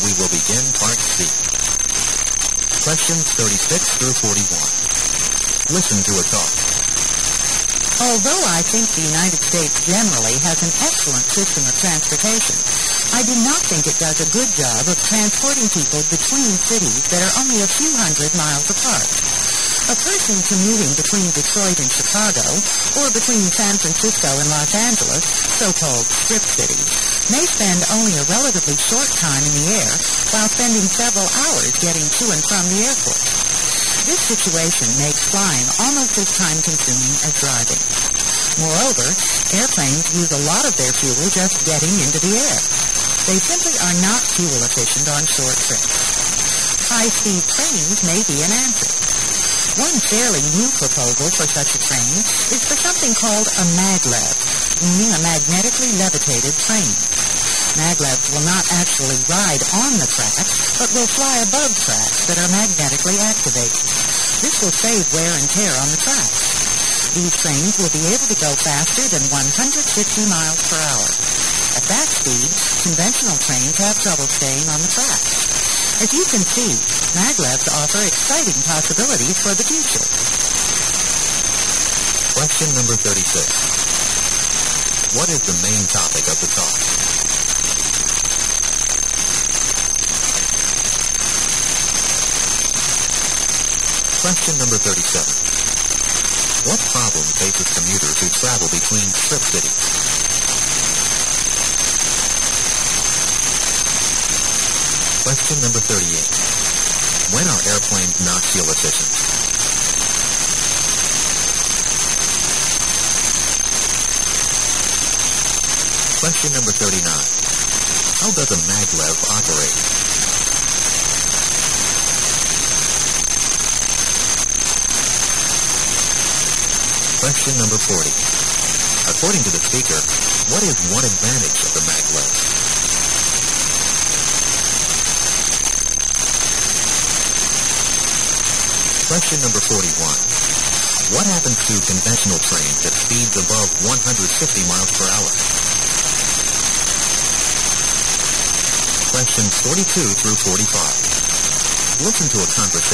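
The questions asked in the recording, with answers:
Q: What is the main topic of the talk?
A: High-speed maglev trains as a way to travel between nearby cities

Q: What problem faces commuters who travel between strip cities?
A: They spend hours getting to and from the airport

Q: When are airplanes not fuel efficient?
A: On short trips

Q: How does a maglev operate?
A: It flies above magnetically activated tracks

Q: According to the speaker, what is one advantage of the maglev?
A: It saves wear and tear on the tracks

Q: What happens to conventional trains at speeds above 150 miles per hour?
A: They have trouble staying on the tracks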